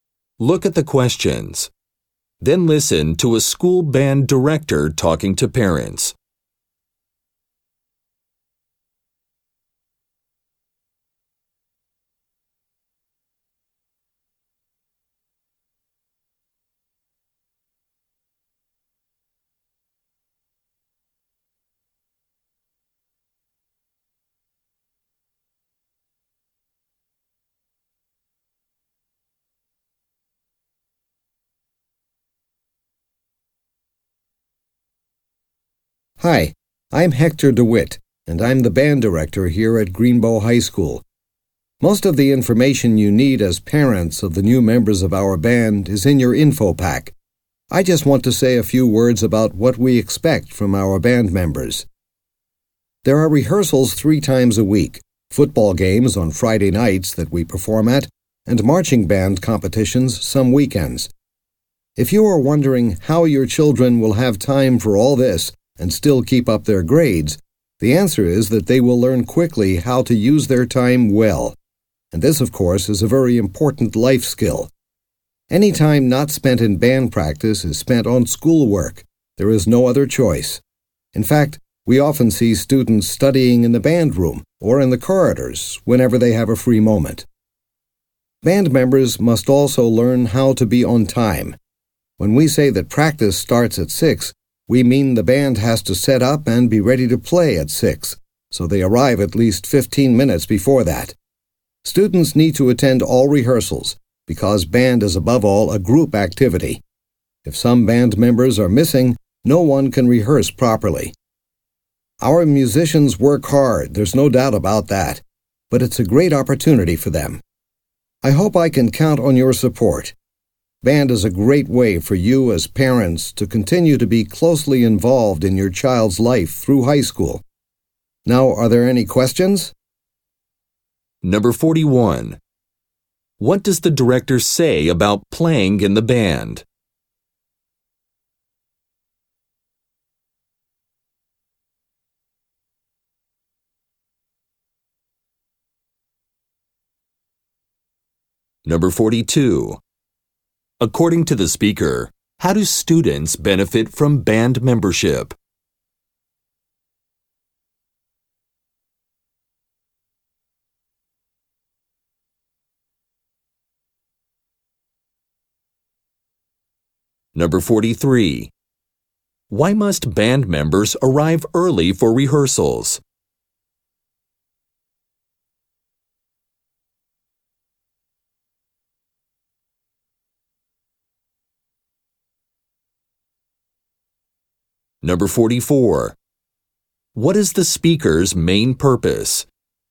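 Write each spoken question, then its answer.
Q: According to the speaker, how do students benefit from band membership?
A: They learn to use their time well

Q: Why must band members arrive early for rehearsals?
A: To set up and be ready to play at the start time

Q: What is the speaker's main purpose?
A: To explain what is expected of band members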